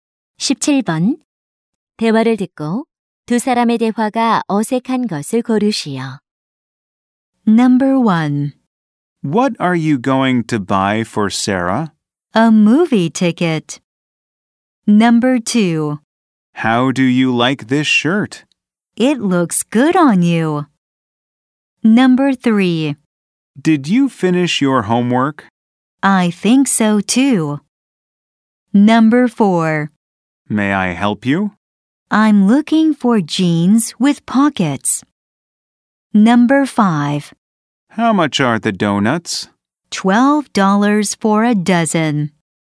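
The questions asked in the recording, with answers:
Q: 대화를 듣고 두 사람의 대화가 어색한 것을 고르시오.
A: 3번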